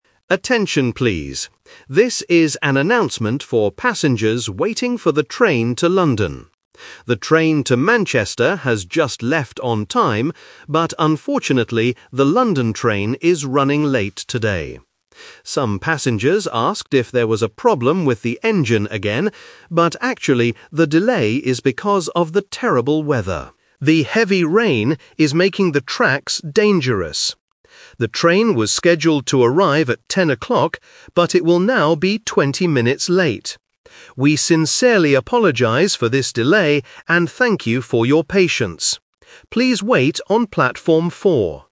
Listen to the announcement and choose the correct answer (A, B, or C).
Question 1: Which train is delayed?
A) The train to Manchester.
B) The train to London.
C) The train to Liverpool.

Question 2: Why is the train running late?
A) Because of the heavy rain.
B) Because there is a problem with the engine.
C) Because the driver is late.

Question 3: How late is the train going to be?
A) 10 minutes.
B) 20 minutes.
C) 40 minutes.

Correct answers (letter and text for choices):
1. B) The train to London.
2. A) Because of the heavy rain.
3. B) 20 minutes.

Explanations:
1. The announcer says, "unfortunately, the London train is running late today." Trap: Option (A) is a trap. The Manchester train is mentioned right before, but the announcer clearly states it "has just left on time". Option (C) is a famous UK city but is not mentioned.
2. The announcer explains the real reason: "the delay is because of the terrible weather. The heavy rain..." Trap: Option (B) is the "Twist/Expectation" trap. Passengers thought or asked if it was an engine problem, but the announcer says "actually..." to correct that idea. Option (C) is not mentioned.
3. The announcer states, "it will now be 20 minutes late." Trap: Option (A) uses the number 10, which sounds like "10:00" (the original arrival time). Option (C) uses the number 4, which is the platform number ("Platform 4").

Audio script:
Announcer: Attention, please. This is an announcement for passengers waiting for the train to London. The train to Manchester has just left on time, but unfortunately, the London train is running late today. Some passengers asked if there was a problem with the engine again, but actually, the delay is because of the terrible weather. The heavy rain is making the tracks dangerous. The train was scheduled to arrive at 10:00, but it will now be 20 minutes late. We sincerely apologize for this delay and thank you for your patience. Please wait on Platform 4.

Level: A2